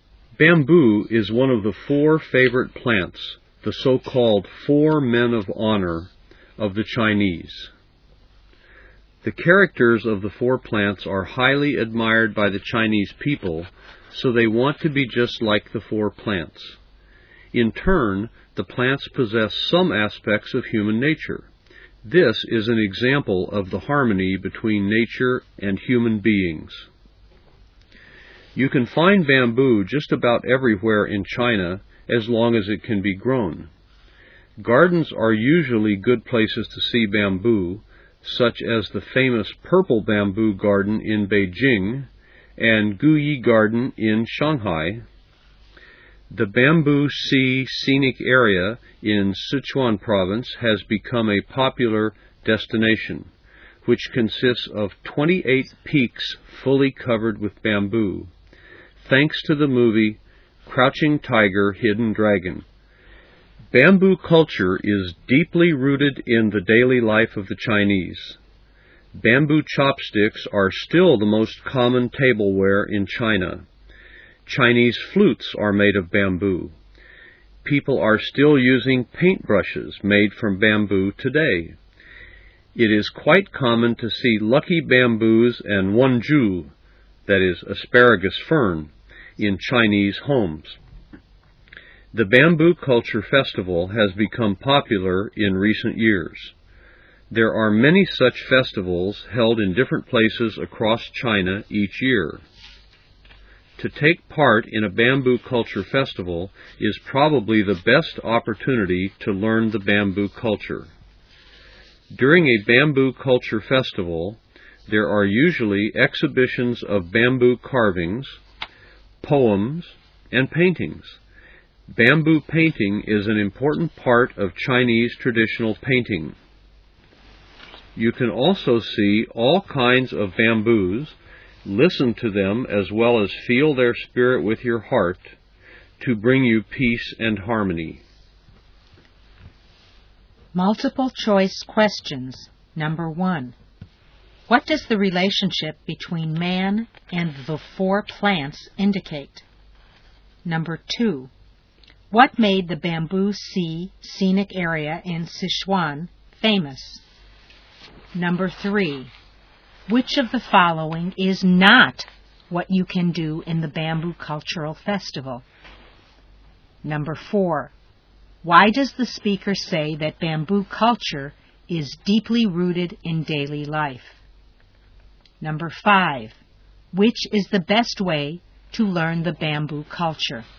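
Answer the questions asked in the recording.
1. The harmony between nature and human beings
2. The movie Crouching Tiger, Hidden Dragon
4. Bamboo is used for everyday things like chopsticks, flutes and paintbrushes
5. To take part in a bamboo culture festival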